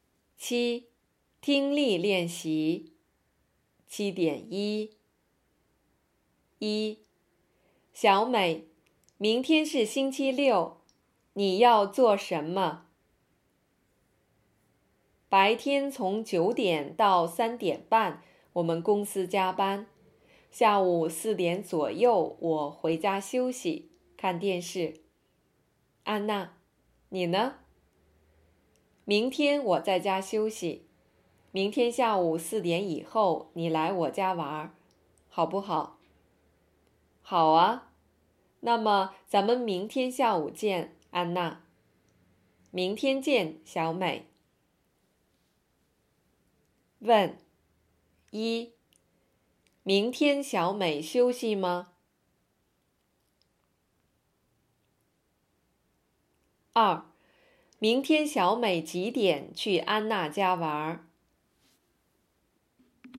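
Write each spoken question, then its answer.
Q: 明天小美几点去安娜家玩儿?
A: 下午4点以后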